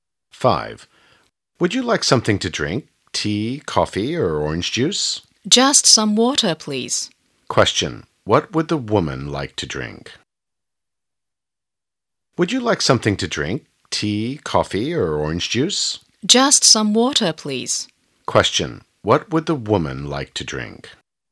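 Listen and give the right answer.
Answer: Some water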